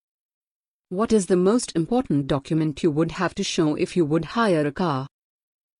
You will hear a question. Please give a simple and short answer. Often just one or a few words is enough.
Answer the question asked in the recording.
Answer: A driving licence